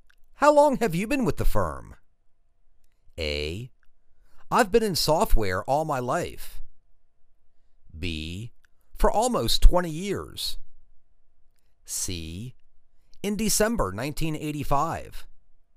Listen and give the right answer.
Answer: For almost 20 years.